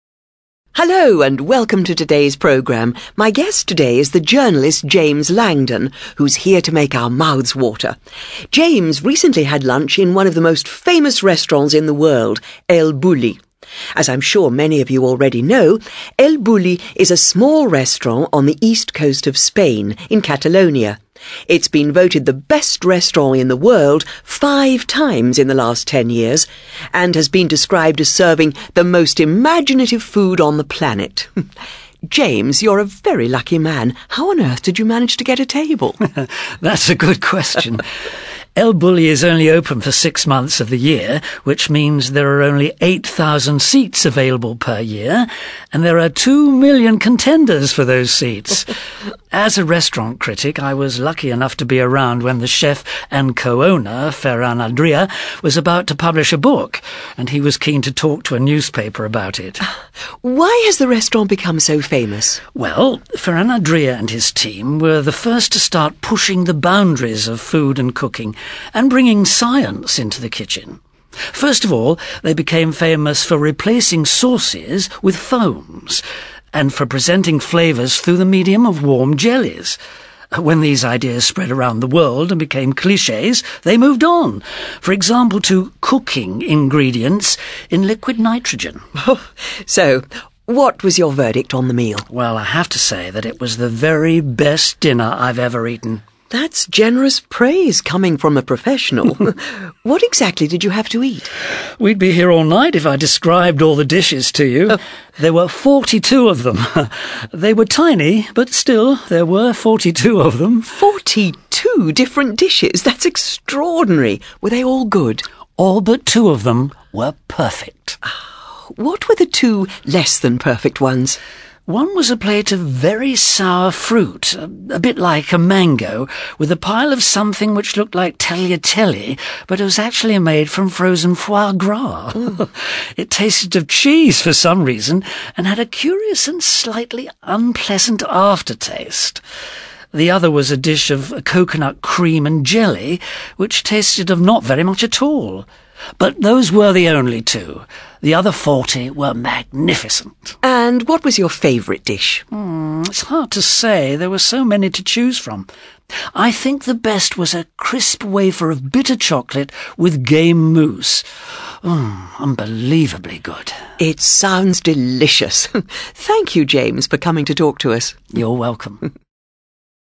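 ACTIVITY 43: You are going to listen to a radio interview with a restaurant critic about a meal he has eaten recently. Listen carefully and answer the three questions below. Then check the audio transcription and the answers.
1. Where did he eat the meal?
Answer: At El Bulli, in Catalonia, Spain

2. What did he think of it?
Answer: It was the very best dinner he had ever eaten

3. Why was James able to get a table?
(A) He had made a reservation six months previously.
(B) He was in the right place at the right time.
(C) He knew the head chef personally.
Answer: He was in the right place at the right time.

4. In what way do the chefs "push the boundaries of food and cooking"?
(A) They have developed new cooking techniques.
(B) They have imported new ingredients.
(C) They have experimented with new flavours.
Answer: They have developed new cooking techniques.

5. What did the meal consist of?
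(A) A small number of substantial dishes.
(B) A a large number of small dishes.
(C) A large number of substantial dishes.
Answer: A a large number of small dishes.

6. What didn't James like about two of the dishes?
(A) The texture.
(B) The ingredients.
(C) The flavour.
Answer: The flavour.

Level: CAE

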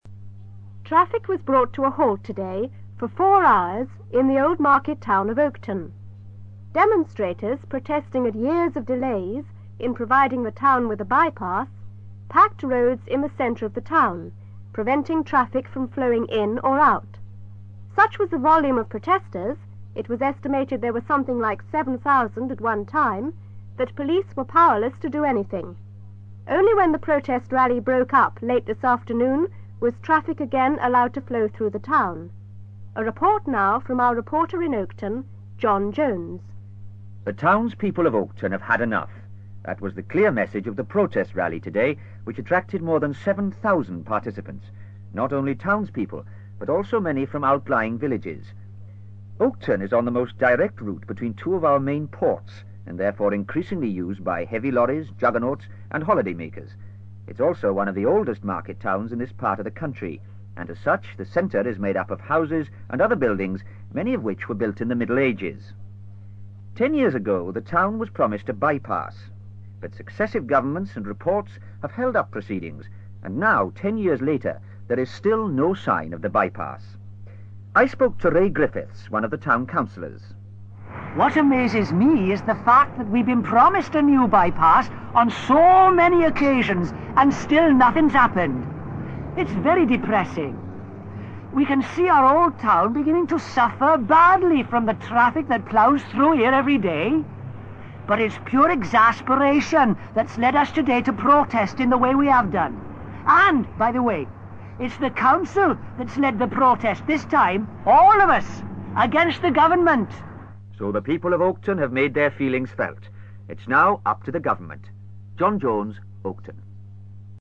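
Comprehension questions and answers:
For questions 1-3, choose the answer (A, B, C or D) which fits best according to what you hear.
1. Traffic came to a standstill in Oakton because...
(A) there was a police rally in the town.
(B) the river near the town overflowed into the centre.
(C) there was a massive amount of cars in the centre of the town.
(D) there was a large crowd demanding a new by-pass.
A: there was a large crowd demanding a new by-pass.

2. What has happened in the past ten years?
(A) The population has grown by 7,000.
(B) Plans for the new road have constantly been postponed.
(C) Some of the very old buildings have fallen down.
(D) The town has become an extremely popular holiday resort.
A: Plans for the new road have constantly been postponed.

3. When interviewed, Ray Griffiths was...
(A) extremely apprehensive.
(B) very depressed.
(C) exasperated.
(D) utterly amazed.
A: exasperated.

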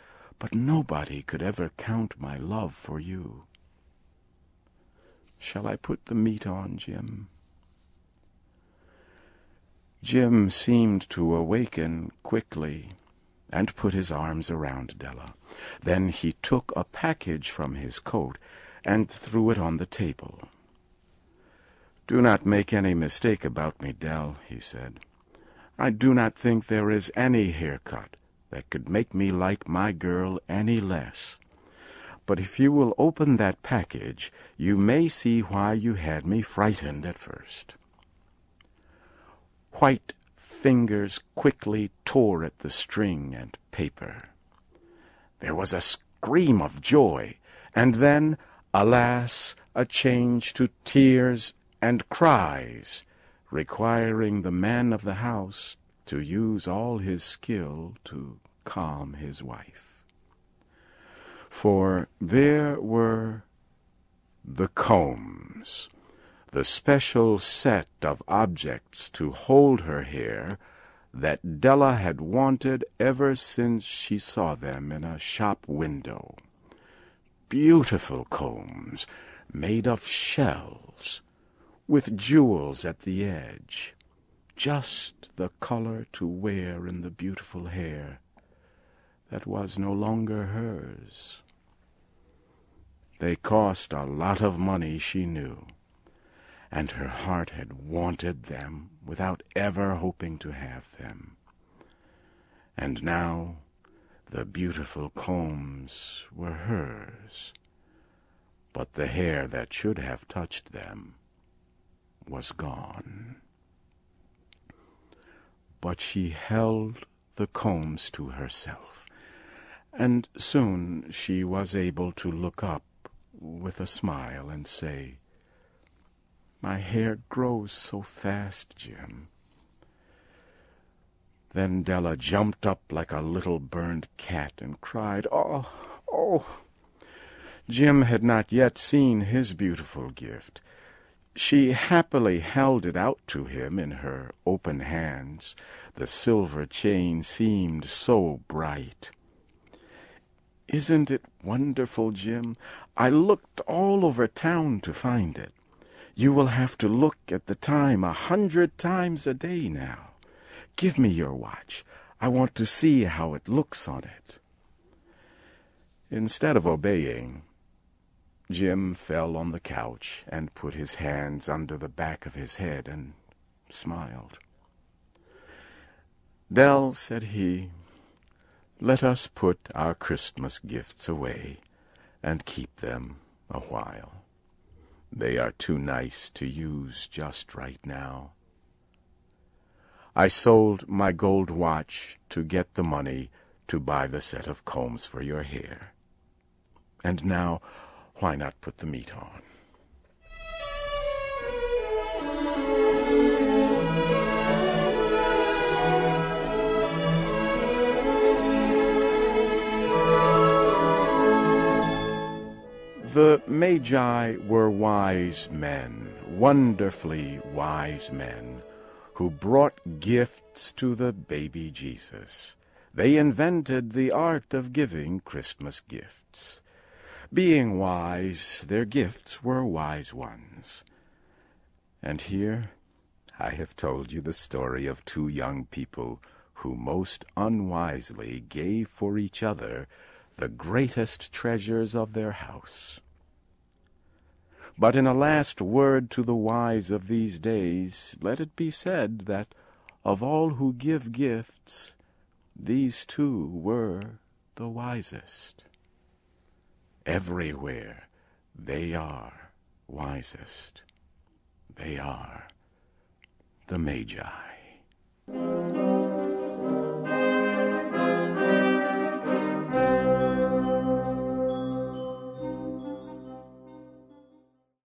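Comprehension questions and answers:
Listen carefully and for questions 1-6, choose the answer (A, B, C or D) which you think best completes each question.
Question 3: What does Della's husband buy for her?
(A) Hair combs.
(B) Gets their china out of pawn.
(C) A better wedding ring.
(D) A locket.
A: Hair combs.

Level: CAE - Certificate in Advanced English

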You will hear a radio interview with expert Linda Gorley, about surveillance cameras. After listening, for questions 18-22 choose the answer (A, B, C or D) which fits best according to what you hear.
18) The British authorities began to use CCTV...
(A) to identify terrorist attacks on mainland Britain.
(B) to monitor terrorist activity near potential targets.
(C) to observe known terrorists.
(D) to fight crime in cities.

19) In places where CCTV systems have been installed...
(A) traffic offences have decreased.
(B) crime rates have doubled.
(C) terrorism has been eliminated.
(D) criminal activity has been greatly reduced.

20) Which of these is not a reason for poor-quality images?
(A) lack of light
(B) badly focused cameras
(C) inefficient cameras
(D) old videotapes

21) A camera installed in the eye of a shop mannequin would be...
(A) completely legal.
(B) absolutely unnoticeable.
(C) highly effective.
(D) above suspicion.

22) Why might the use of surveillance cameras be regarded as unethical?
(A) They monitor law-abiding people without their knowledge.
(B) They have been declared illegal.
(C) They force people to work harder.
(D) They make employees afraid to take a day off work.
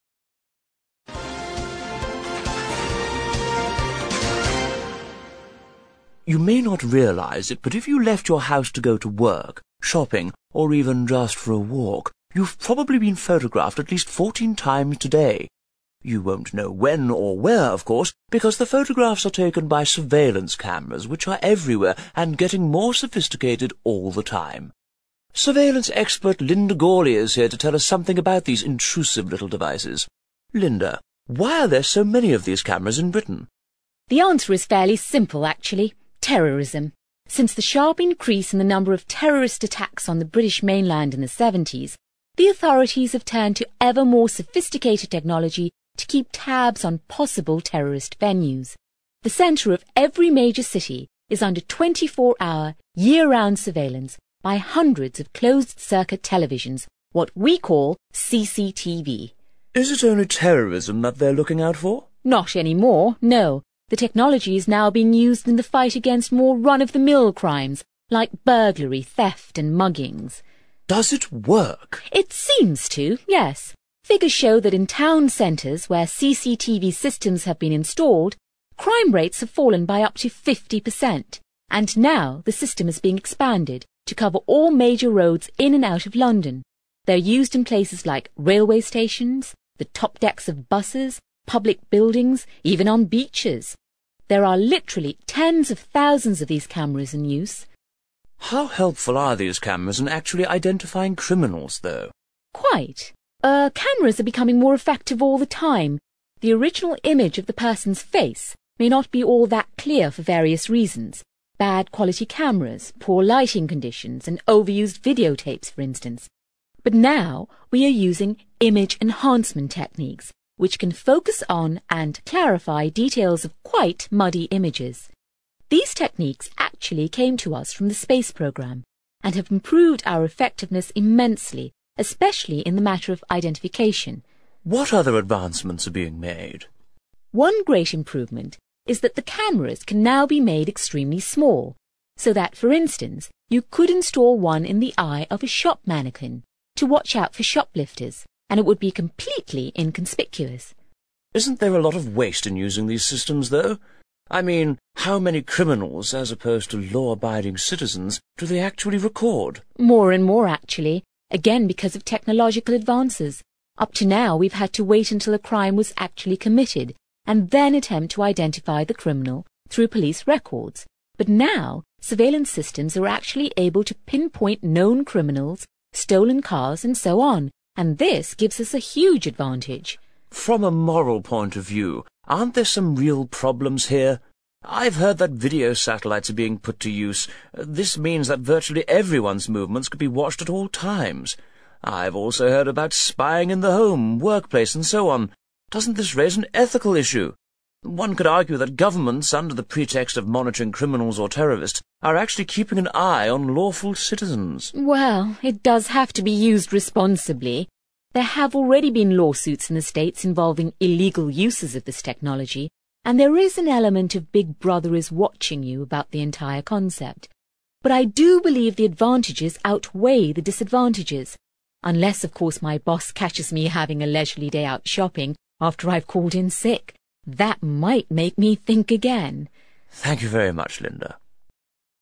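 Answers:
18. to monitor terrorist activity near potential targets.
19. criminal activity has been greatly reduced.
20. badly focused cameras
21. absolutely unnoticeable.
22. They monitor law-abiding people without their knowledge.

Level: CPE Proficiency English

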